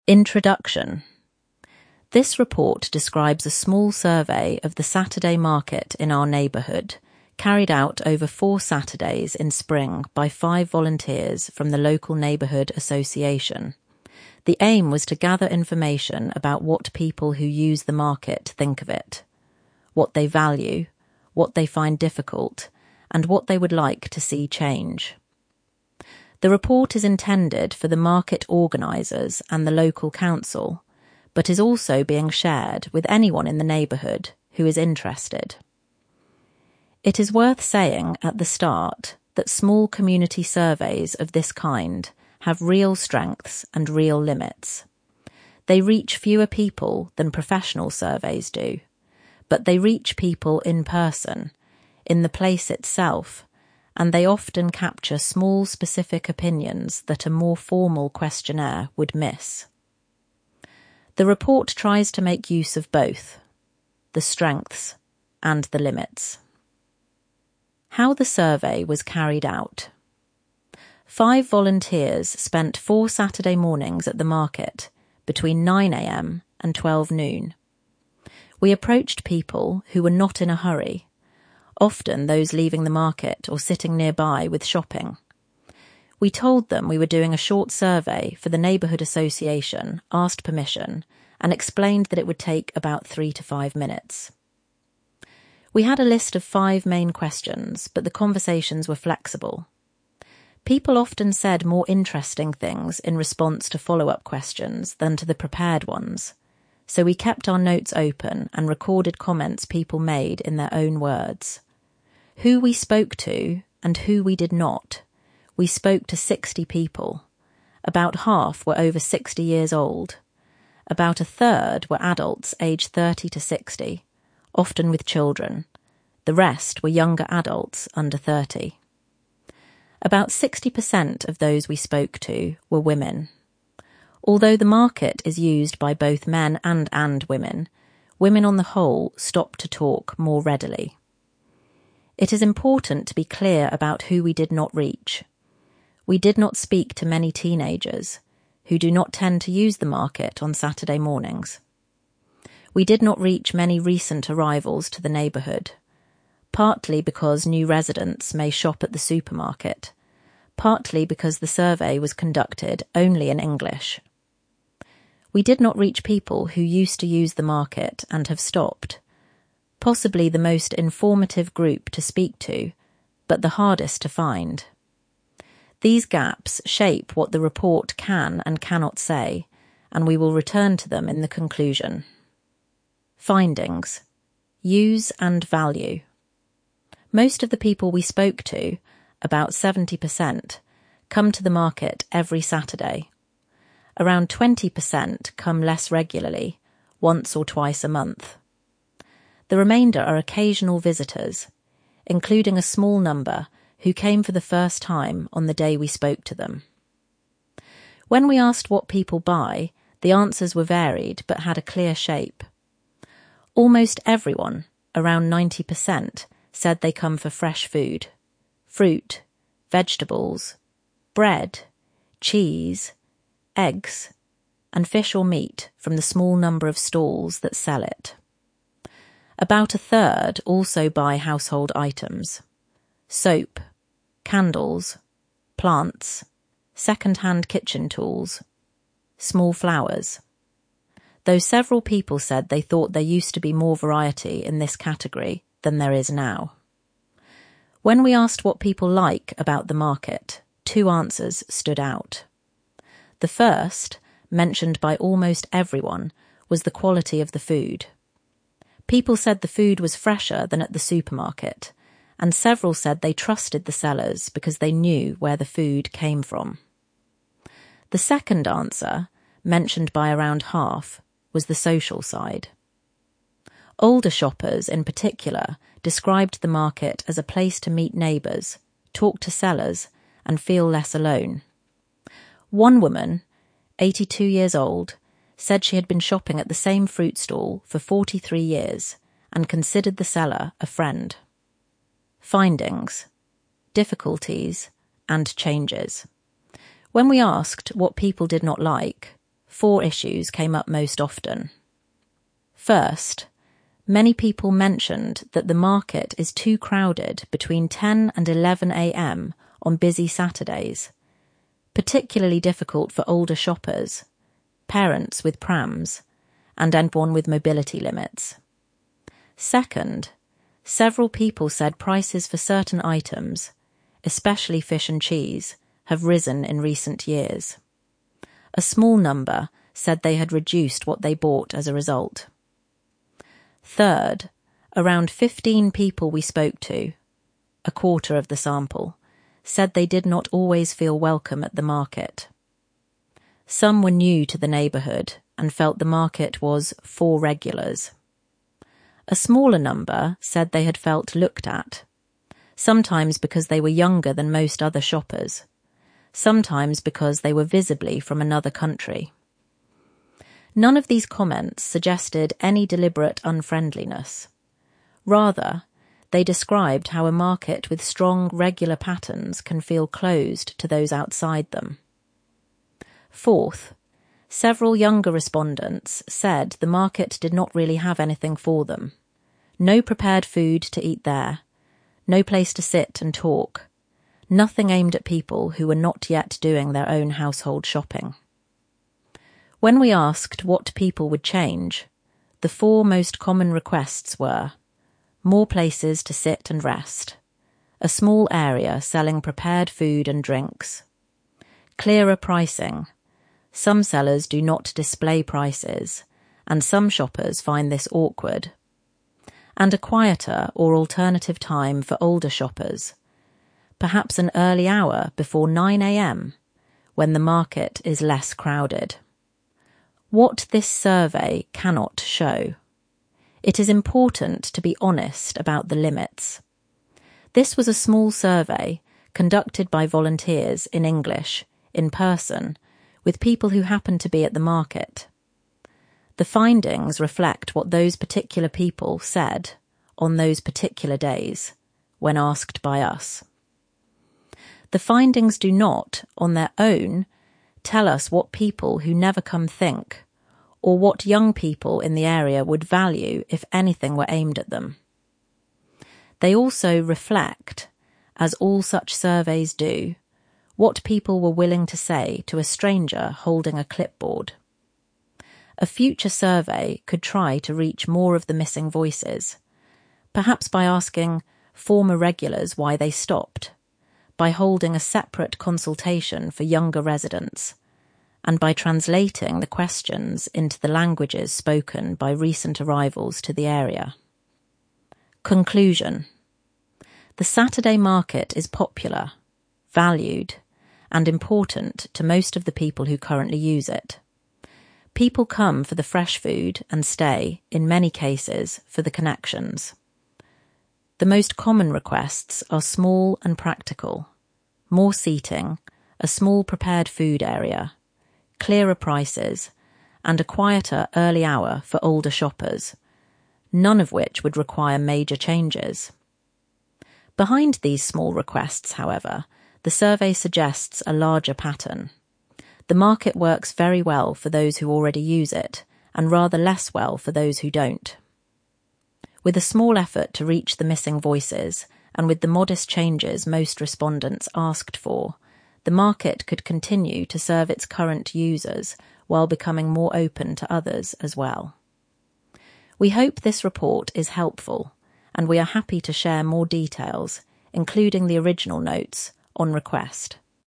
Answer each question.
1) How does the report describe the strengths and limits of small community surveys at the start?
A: Strengths: they reach people in person, in the place itself, and capture specific opinions a formal questionnaire would miss. Limits: they reach fewer people than professional surveys.

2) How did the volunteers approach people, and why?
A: They approached people who 'were not in a hurry' — often those leaving the market or sitting nearby. They told people who they were, asked permission, and explained the survey would take three to five minutes.

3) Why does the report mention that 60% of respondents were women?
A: Because 'although the market is used by both men and women, women on the whole stopped to talk more readily'. The report is being honest that this affects what the survey reflects — women's views are over-represented in the sample.

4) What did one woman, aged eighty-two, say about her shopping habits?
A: She had been shopping at the same fruit stall for forty-three years and considered the seller a friend.

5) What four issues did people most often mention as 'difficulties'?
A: (1) The market is too crowded between 10 and 11 a.m. on busy Saturdays. (2) Prices for certain items (fish, cheese) have risen. (3) Around 15 people (a quarter of the sample) did not always feel welcome — some were new to the area, some felt looked at. (4) Younger respondents said the market 'did not really have anything for them' — no prepared food, no place to sit and talk.

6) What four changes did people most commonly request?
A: (1) More places to sit and rest. (2) A small area selling prepared food and drinks. (3) Clearer pricing — some sellers do not display prices. (4) A quieter or alternative time for older shoppers — perhaps an early hour before 9 a.m.

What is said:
INTRODUCTION
This report describes a small survey of the Saturday market in our neighbourhood, carried out over four Saturdays in spring by five volunteers from the local neighbourhood association. The aim was to gather information about what people who use the market think of it — what they value, what they find difficult, and what they would like to see change. The report is intended for the market organisers and the local council, but is also being shared with anyone in the neighbourhood who is interested.
It is worth saying at the start that small community surveys of this kind have real strengths and real limits. They reach fewer people than professional surveys do. But they reach people in person, in the place itself, and they often capture small specific opinions that a more formal questionnaire would miss. The report tries to make use of both — the strengths and the limits.
HOW THE SURVEY WAS CARRIED OUT
Five volunteers spent four Saturday mornings at the market, between 9 a.m. and 12 noon. We approached people who were not in a hurry — often those leaving the market or sitting nearby with shopping. We told them we were doing a short survey for the neighbourhood association, asked permission, and explained that it would take about three to five minutes.
We had a list of five main questions, but the conversations were flexible. People often said more interesting things in response to follow-up questions than to the prepared ones, so we kept our notes open and recorded comments people made in their own words.
WHO WE SPOKE TO, AND WHO WE DID NOT
We spoke to 60 people. About half were over 60 years old; about a third were adults aged 30 to 60, often with children; the rest were younger adults under 30. About 60% of those we spoke to were women — although the market is used by both men and women, women on the whole stopped to talk more readily.
It is important to be clear about who we did not reach. We did not speak to many teenagers, who do not tend to use the market on Saturday mornings. We did not reach many recent arrivals to the neighbourhood — partly because new residents may shop at the supermarket, partly because the survey was conducted only in English. We did not reach people who used to use the market and have stopped — possibly the most informative group to speak to, but the hardest to find. These gaps shape what the report can and cannot say, and we will return to them in the conclusion.
FINDINGS
USE AND VALUE
Most of the people we spoke to (about 70%) come to the market every Saturday. Around 20% come less regularly, once or twice a month. The remainder are occasional visitors, including a small number who came for the first time on the day we spoke to them.
When we asked what people buy, the answers were varied but had a clear shape. Almost everyone (around 90%) said they come for fresh food — fruit, vegetables, bread, cheese, eggs, and fish or meat from the small number of stalls that sell it. About a third also buy household items — soap, candles, plants, secondhand kitchen tools, small flowers — though several people said they thought there used to be more variety in this category than there is now.
When we asked what people like about the market, two answers stood out. The first, mentioned by almost everyone, was the quality of the food. People said the food was fresher than at the supermarket, and several said they trusted the sellers because they knew where the food came from. The second answer, mentioned by around half, was the social side. Older shoppers in particular described the market as a place to meet neighbours, talk to sellers, and feel less alone. One woman, eighty-two years old, said she had been shopping at the same fruit stall for forty-three years and considered the seller a friend.
FINDINGS
DIFFICULTIES AND CHANGES
When we asked what people did not like, four issues came up most often.
First, many people mentioned that the market is too crowded between 10 and 11 a.m. on busy Saturdays — particularly difficult for older shoppers, parents with prams, and anyone with mobility limits.
Second, several people said prices for certain items, especially fish and cheese, have risen in recent years. A small number said they had reduced what they bought as a result.
Third, around fifteen people we spoke to (a quarter of the sample) said they did not always feel welcome at the market. Some were new to the neighbourhood and felt the market was 'for regulars'. A smaller number said they had felt looked at — sometimes because they were younger than most other shoppers, sometimes because they were visibly from another country. None of these comments suggested any deliberate unfriendliness; rather, they described how a market with strong regular patterns can feel closed to those outside them.
Fourth, several younger respondents said the market did not really have anything for them — no prepared food to eat there, no place to sit and talk, nothing aimed at people who were not yet doing their own household shopping.
When we asked what people would change, the four most common requests were: more places to sit and rest; a small area selling prepared food and drinks; clearer pricing (some sellers do not display prices, and some shoppers find this awkward); and a quieter or alternative time for older shoppers — perhaps an early hour before 9 a.m. when the market is less crowded.
WHAT THIS SURVEY CANNOT SHOW
It is important to be honest about the limits. This was a small survey, conducted by volunteers, in English, in person, with people who happened to be at the market. The findings reflect what those particular people said, on those particular days, when asked by us. The findings do not, on their own, tell us what people who never come think, or what young people in the area would value if anything were aimed at them. They also reflect, as all such surveys do, what people were willing to say to a stranger holding a clipboard.
A future survey could try to reach more of the missing voices — perhaps by asking former regulars why they stopped, by holding a separate consultation for younger residents, and by translating the questions into the languages spoken by recent arrivals to the area.
CONCLUSION
The Saturday market is popular, valued, and important to most of the people who currently use it. People come for the fresh food and stay, in many cases, for the connections. The most common requests are small and practical — more seating, a small prepared-food area, clearer prices, and a quieter early hour for older shoppers — none of which would require major changes.
Behind these small requests, however, the survey suggests a larger pattern: the market works very well for those who already use it, and rather less well for those who don't. With a small effort to reach the missing voices, and with the modest changes most respondents asked for, the market could continue to serve its current users while becoming more open to others as well. We hope this report is helpful, and we are happy to share more details, including the original notes, on request.
to gather information
(phrase) to collect facts and opinions from people